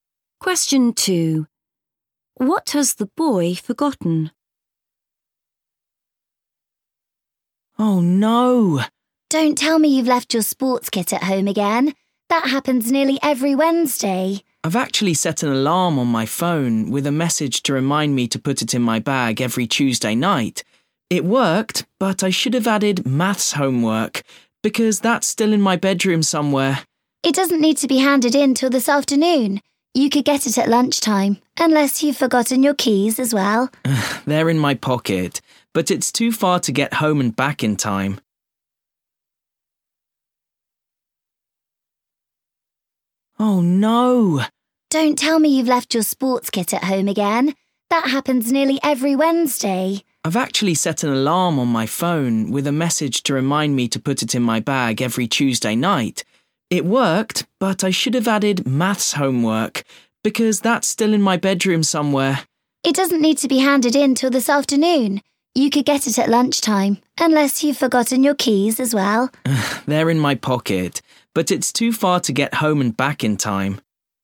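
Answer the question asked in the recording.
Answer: his maths homework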